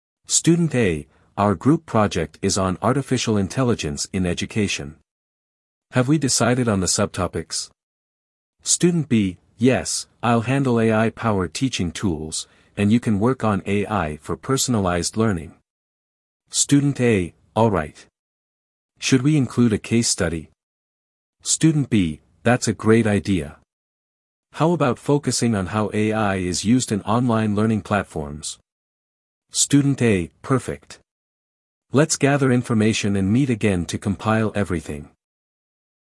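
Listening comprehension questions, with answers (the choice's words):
What is the group project topic?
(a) AI in healthcare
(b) AI in education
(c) AI in marketing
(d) AI in transportation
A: AI in education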